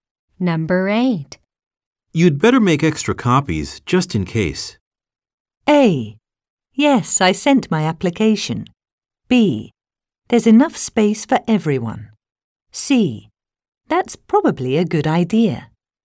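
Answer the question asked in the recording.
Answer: C: That's probably a good idea.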